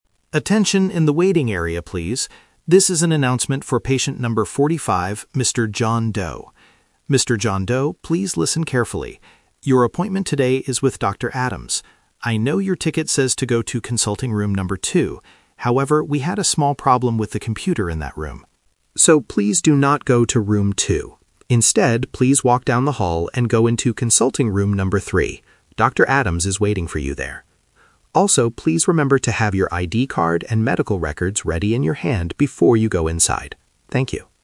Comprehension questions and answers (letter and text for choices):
Listen to the announcement in a clinic waiting room. Choose the correct answer (A, B, or C) for each question.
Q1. Who is the announcer calling?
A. Dr. Adams.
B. Patient number 45.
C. Patient number 3.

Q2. Which room should Mr. John Doe go to right now?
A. Room number 2.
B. Room number 3.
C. Room number 45.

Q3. What does the patient need to have ready in his hand?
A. His ID card and medical records.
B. His health insurance card.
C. His credit card to pay the fee.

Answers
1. B. Patient number 45.
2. B. Room number 3.
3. A. His ID card and medical records.

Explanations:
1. The announcer explicitly says, "This is an announcement for patient number 45, Mr. John Doe." Trap A is wrong: Dr. Adams is the doctor he will meet, not the person being called. Trap C is wrong (Number Trap): Number 3 is the room number, not the patient's ticket number.
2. The announcer tells him to "walk down the hall and go into consulting room number 3." Trap A is wrong (The Twist): The ticket says room 2, but the announcer says "please do not go to room 2" because of a computer problem. Trap C is wrong (Number Trap): 45 is his patient number, not a room.
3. At the end, the announcer says, "please remember to have your ID card and medical records ready in your hand." Trap B is wrong: A health insurance card is very common at a clinic, but it is not mentioned in this announcement. Trap C is wrong: Paying with a credit card is plausible later, but it is not what he needs to hold right now.

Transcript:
Announcer (Loudspeaker): Attention in the waiting area, please. This is an announcement for patient number 45, Mr. John Doe. Mr. John Doe, please listen carefully. Your appointment today is with Dr. Adams. I know your ticket says to go to consulting room number 2. However, we had a small problem with the computer in that room. So, please do not go to room 2. Instead, please walk down the hall and go into consulting room number 3. Dr. Adams is waiting for you there. Also, please remember to have your ID card and medical records ready in your hand before you go inside. Thank you.